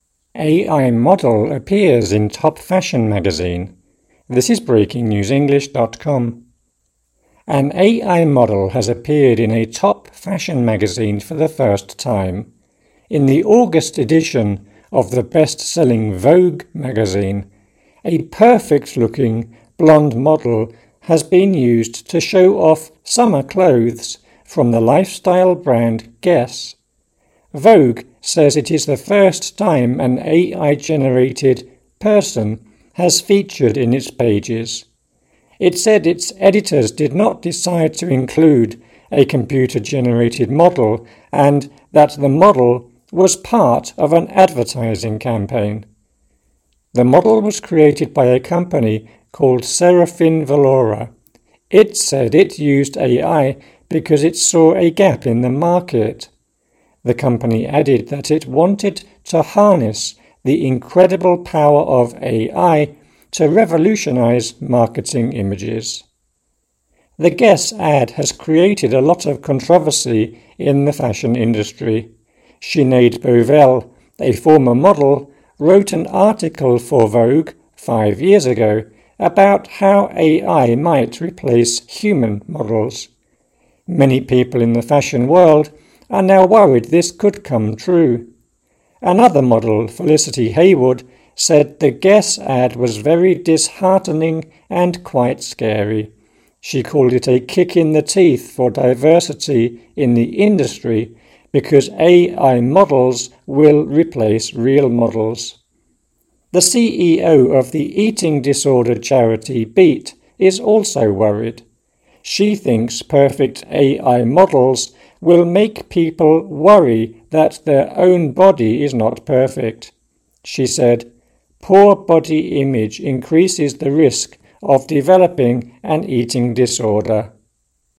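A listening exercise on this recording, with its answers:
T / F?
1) An AI model is in a leading fashion magazine for the second time.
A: F

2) The model was modelling clothes for an autumn collection of clothes.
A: F

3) It wasn't the magazine's editors' decision to put the AI model in its mag.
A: T

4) The model was created because a company saw a gap in the market.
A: T

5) Five years ago, a model predicted AI models would replace real ones.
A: T

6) Another model said a photographer kicked her in the teeth.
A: F

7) The boss of an eating disorder charity said AI models could help people.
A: F

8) The boss of the charity said AI models could lead to eating disorders.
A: T

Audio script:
AI model appears in top fashion magazine
An AI model has appeared in a top fashion magazine for the first time. In the August edition of the best-selling "Vogue" magazine, a "perfect-looking" blonde model has been used to show off summer clothes from the lifestyle brand Guess. 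Vogue says it is the first time an AI-generated "person" has featured in its pages. It said its editors did not decide to include a computer-generated model, and that the model was part of an advertising campaign. The model was created by a company called Seraphinne Vallora. It said it used AI because it saw a "gap in the market". The company added that it wanted to "harness the incredible power of AI to revolutionize marketing images".
The Guess ad has created a lot of controversy in the fashion industry. Sinead Bovell, a former model, wrote an article for Vogue five years ago about how AI might replace human models. Many people in the fashion world are now worried this could come true. Another model, Felicity Hayward, said the Guess ad was "very disheartening and quite scary". She called it a "kick in the teeth" for diversity in the industry because AI models will replace real models. 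The CEO of the eating disorder charity Beat is also worried. She thinks perfect AI models will make people worry that their own body is not perfect. She said: "Poor body image increases the risk of developing an eating disorder."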